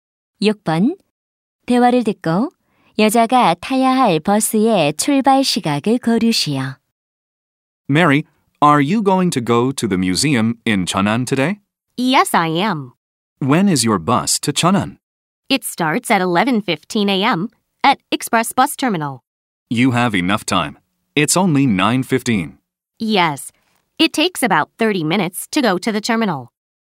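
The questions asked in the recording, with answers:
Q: 대화를 듣고 여자가 타야 할 버스의 출발 시각을 고르시오.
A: 오전 11시 15분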